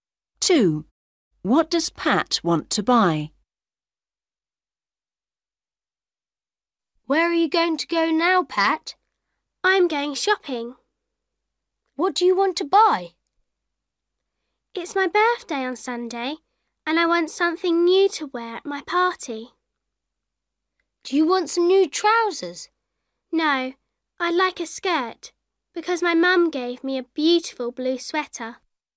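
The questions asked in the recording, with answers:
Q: What does Pat want to buy?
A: A skirt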